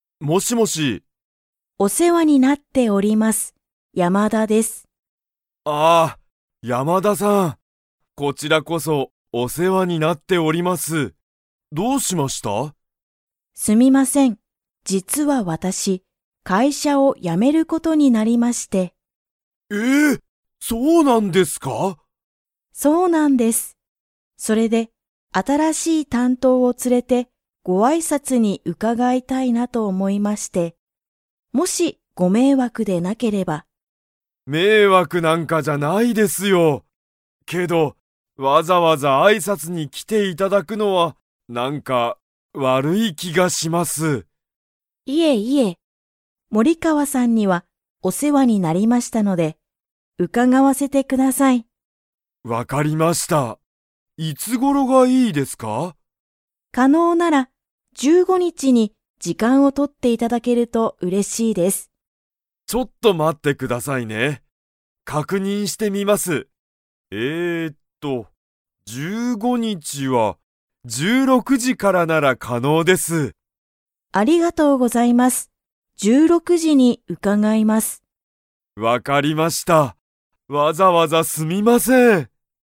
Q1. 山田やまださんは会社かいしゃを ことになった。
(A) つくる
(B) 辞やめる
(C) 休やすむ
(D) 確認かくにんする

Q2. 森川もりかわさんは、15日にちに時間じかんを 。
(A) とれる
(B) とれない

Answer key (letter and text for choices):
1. (B) 辞やめる
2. (A) とれる